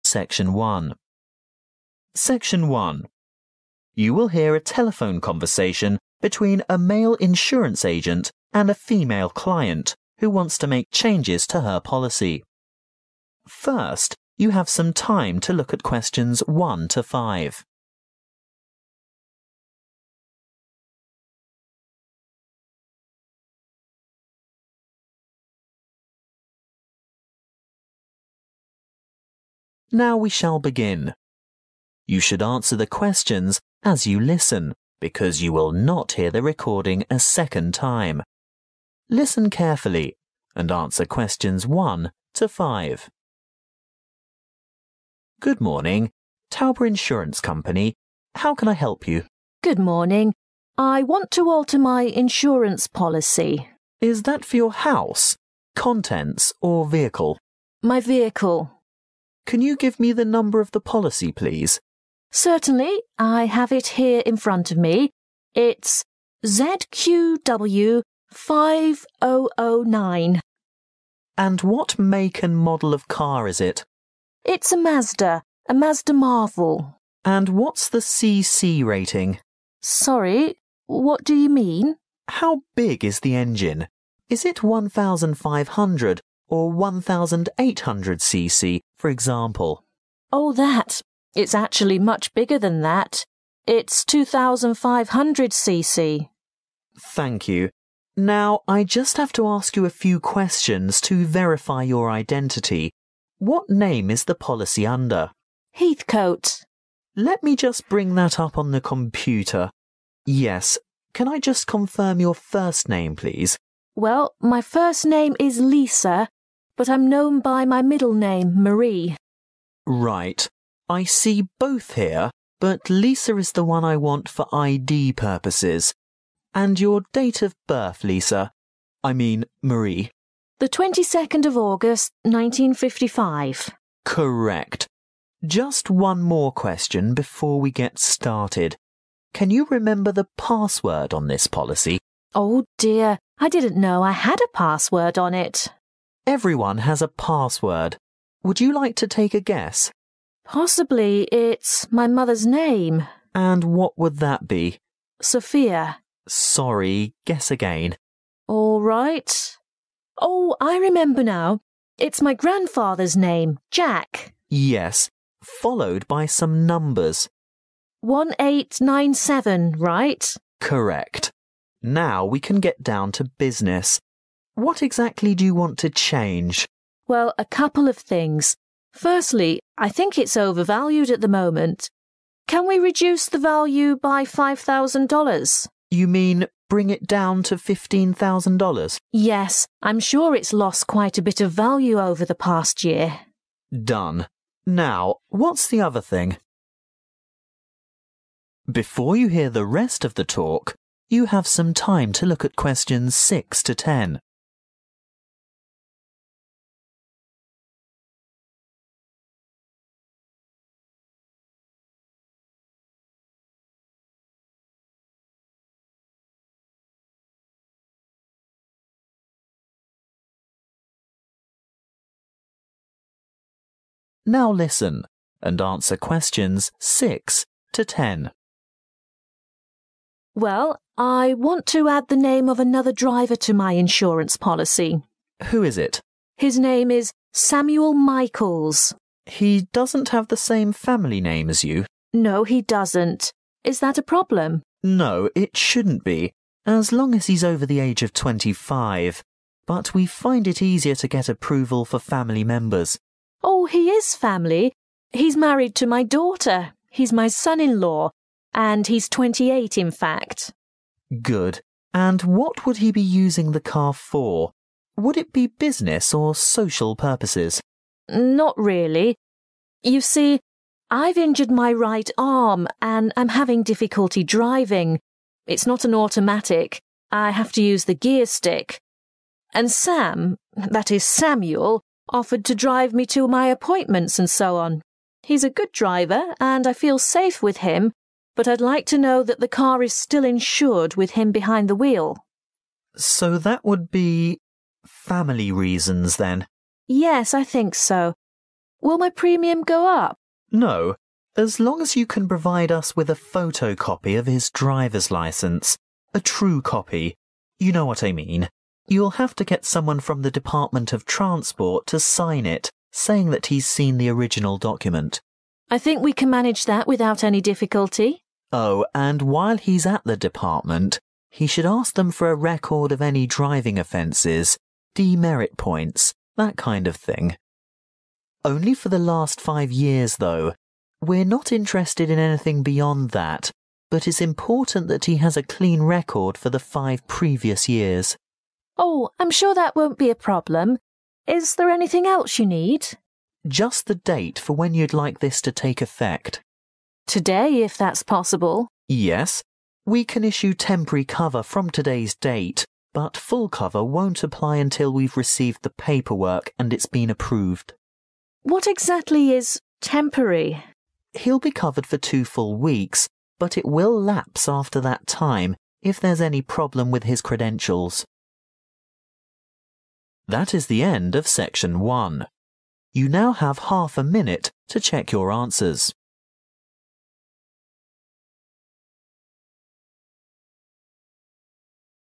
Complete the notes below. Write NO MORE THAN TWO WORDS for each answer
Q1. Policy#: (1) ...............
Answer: ZQW5009

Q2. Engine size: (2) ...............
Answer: 2500cc

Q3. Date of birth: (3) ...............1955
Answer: 22 August

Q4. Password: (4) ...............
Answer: Jack 1897

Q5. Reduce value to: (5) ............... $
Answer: 15000

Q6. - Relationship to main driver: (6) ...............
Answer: Son-in-law

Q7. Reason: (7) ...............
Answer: family

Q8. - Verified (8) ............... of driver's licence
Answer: (photo) copy

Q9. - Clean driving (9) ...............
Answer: record

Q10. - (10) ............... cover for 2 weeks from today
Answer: temporary